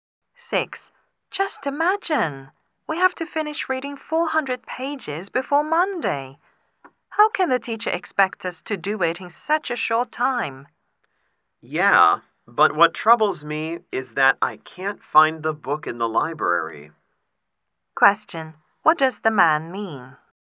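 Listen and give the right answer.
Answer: His bigger problem is that he can't find the book in the library.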